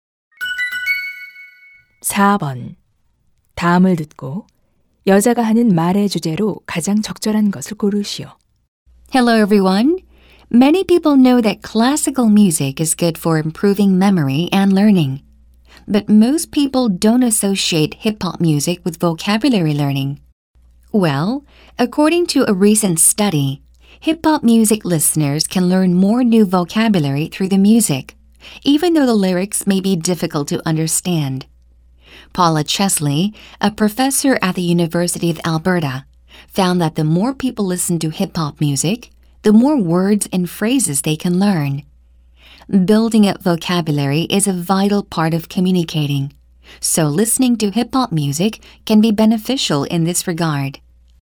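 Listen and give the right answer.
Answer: 힙합 음악 청취가 어휘 학습에 도움이 된다.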